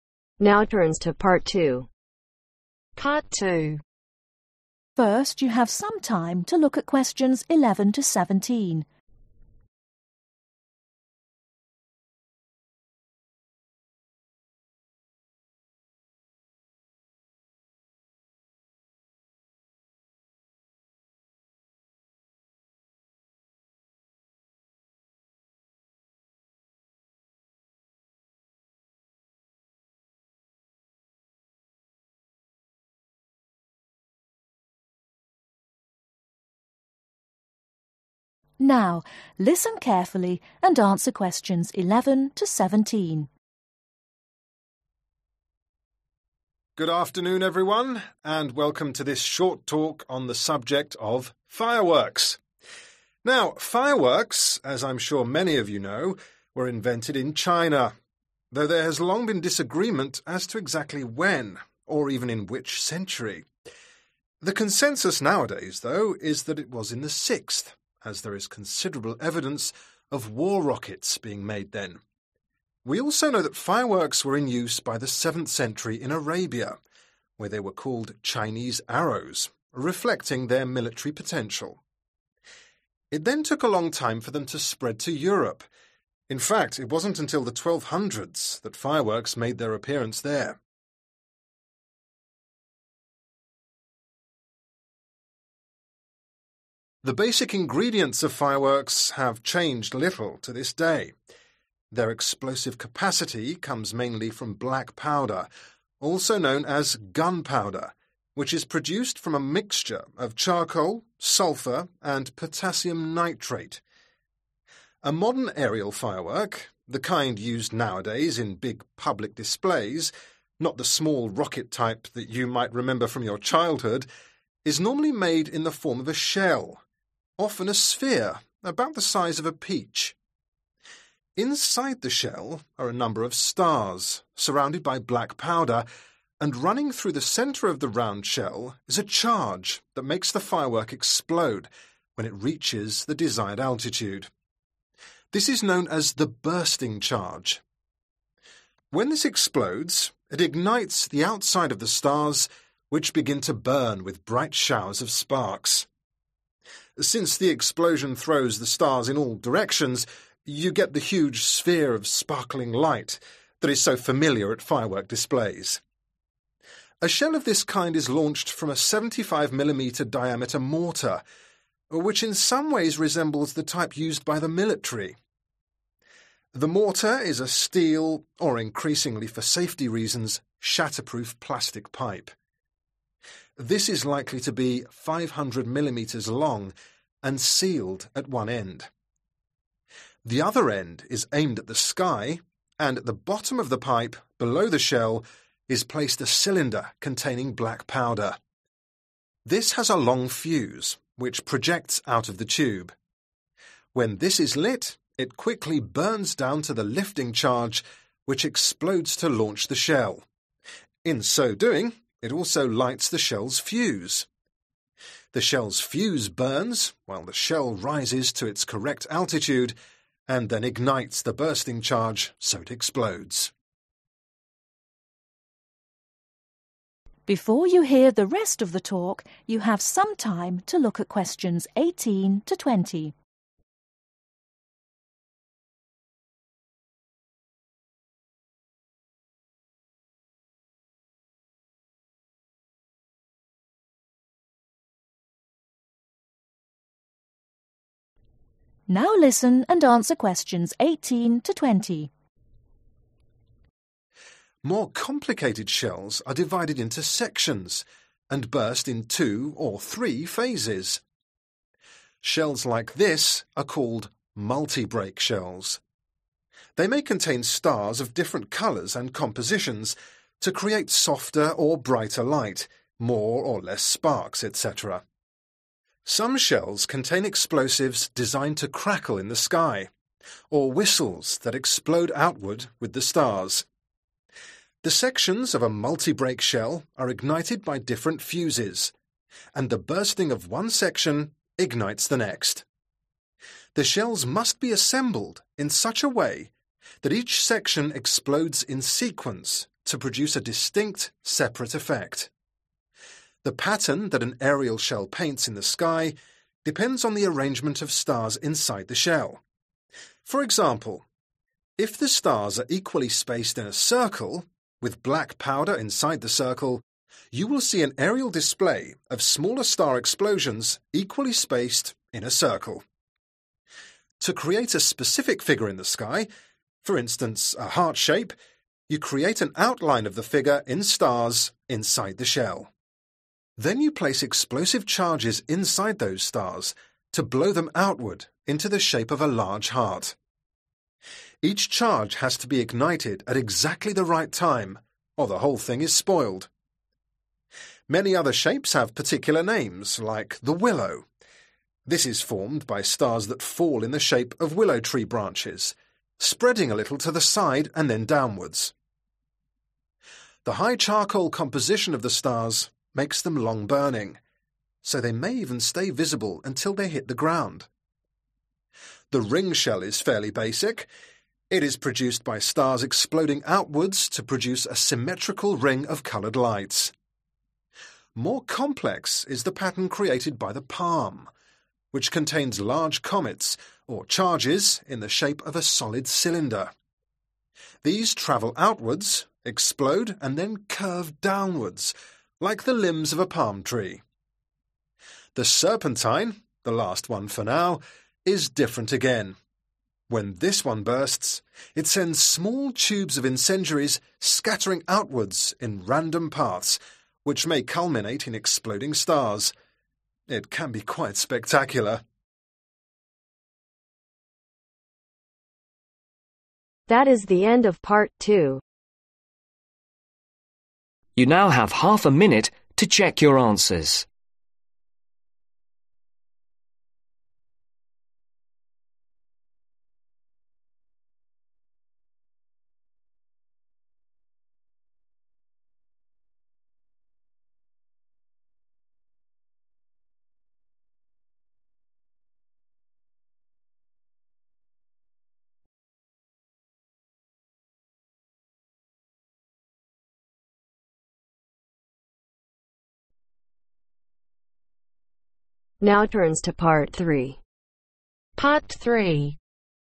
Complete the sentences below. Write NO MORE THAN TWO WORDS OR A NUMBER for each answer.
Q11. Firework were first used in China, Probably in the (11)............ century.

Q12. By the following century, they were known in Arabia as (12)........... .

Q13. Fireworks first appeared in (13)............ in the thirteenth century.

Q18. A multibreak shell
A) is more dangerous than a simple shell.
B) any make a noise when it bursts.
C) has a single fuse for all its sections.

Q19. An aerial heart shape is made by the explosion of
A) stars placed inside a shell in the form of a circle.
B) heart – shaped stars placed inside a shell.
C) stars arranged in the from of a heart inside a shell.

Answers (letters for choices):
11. Sixth/6th
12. Chinese Arrows
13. Europe
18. B
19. C